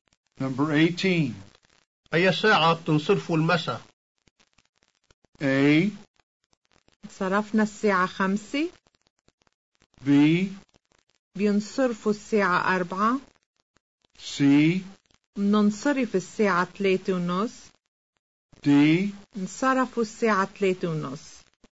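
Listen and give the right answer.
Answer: C: مننصرف الساعة 3:30.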